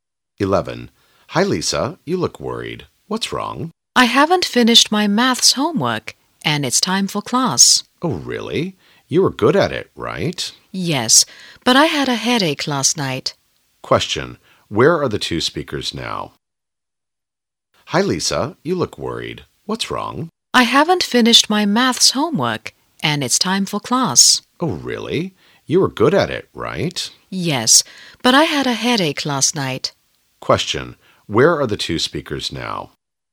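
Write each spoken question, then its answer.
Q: Where are the two speakers now?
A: At school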